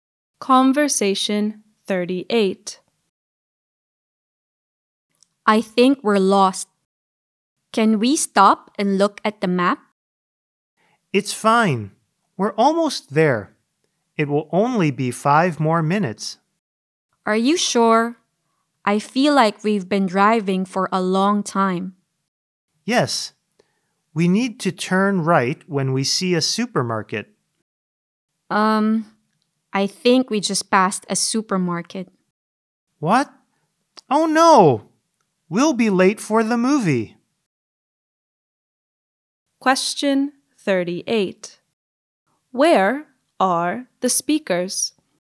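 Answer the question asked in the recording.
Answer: In a car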